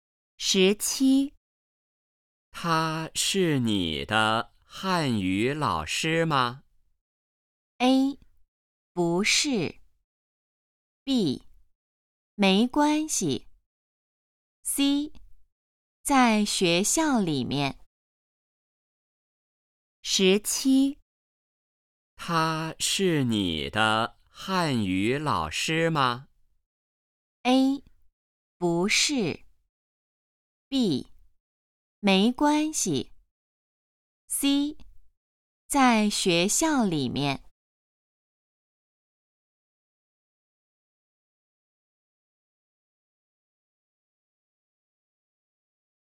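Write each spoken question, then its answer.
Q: 他是你的汉语老师吗?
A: A: 不是。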